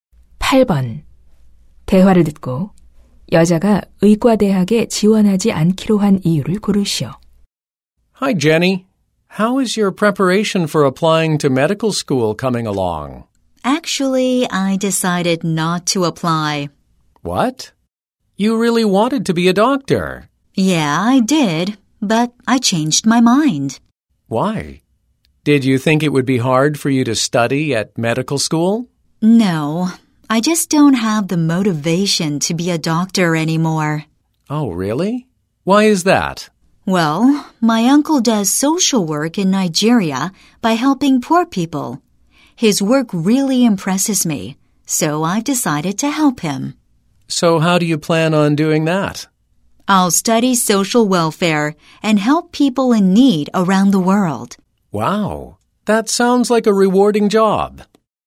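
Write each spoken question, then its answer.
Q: 대화를 듣고 여자가 의과대학에 지원하지 않기로 한 이유를 고르시오.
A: 삼촌의 사회복지 일을 돕고 싶어서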